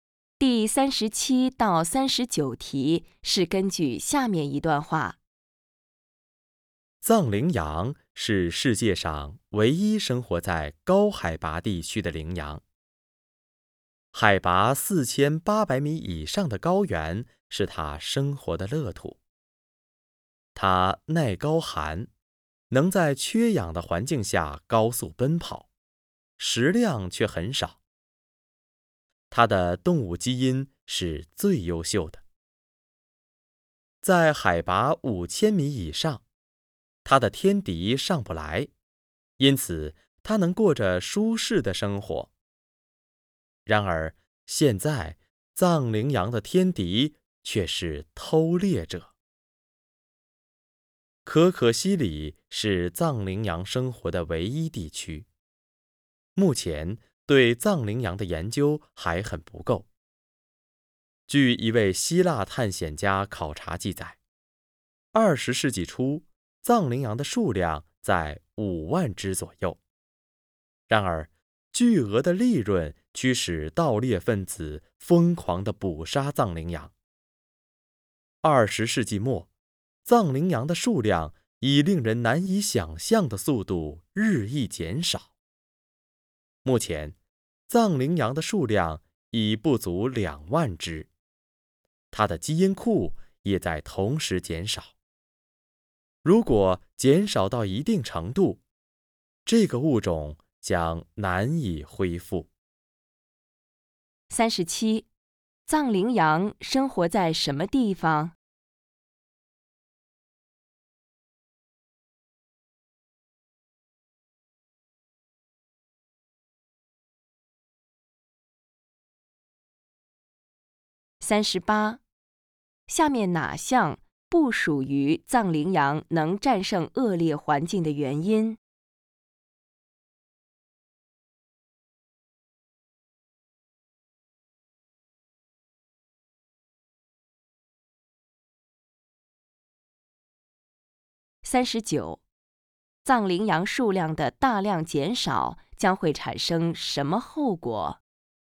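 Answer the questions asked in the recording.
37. 可可西里海拔4800米以上的高原
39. 物种将难以恢复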